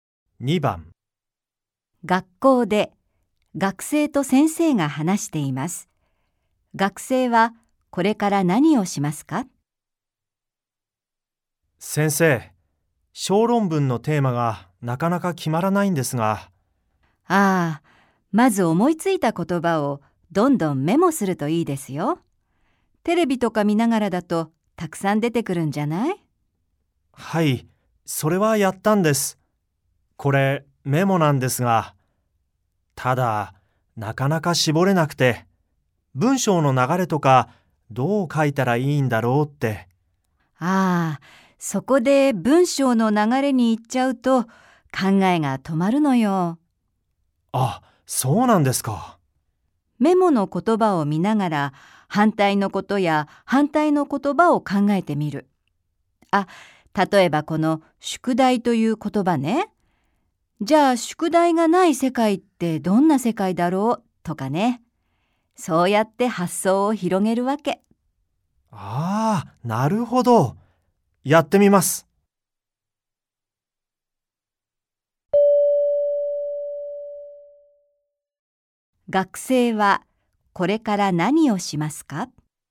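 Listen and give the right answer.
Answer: メモの言葉の反対のことや反対の言葉を考える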